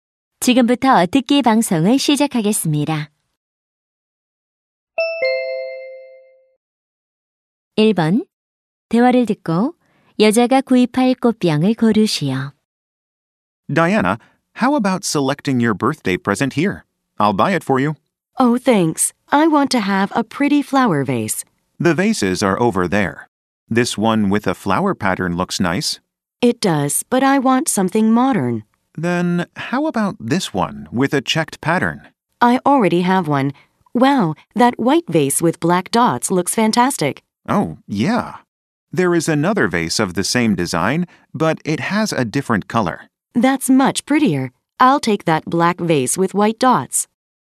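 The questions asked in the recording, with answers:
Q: 대화를 듣고 여자가 구입할 꽃병을 고르시오.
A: 흰 물방울무늬가 있는 검은색 꽃병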